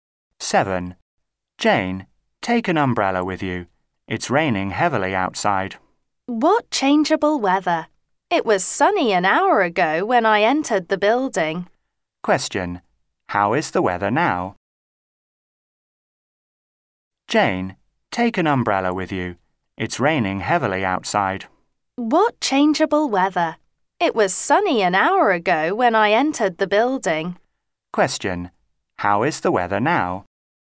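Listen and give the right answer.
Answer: It's raining heavily.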